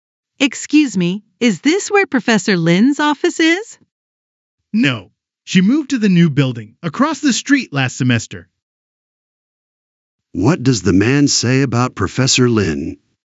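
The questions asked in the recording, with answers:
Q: What does the man say about Professor Lin?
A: She moved to the new building across the street last semester.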